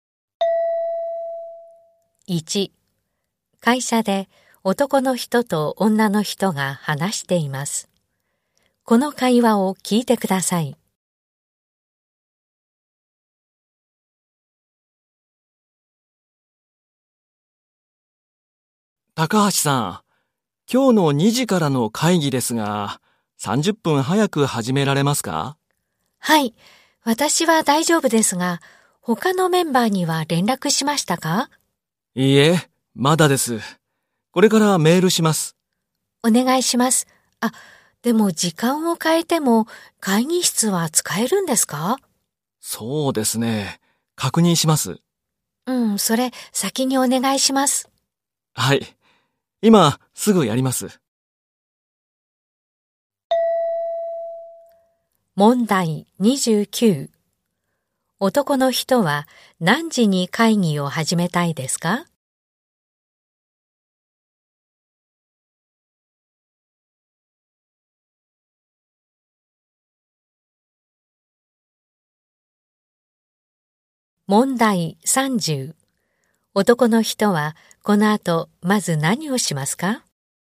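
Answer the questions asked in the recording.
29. 1時30分
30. 会議室が使えるか確認する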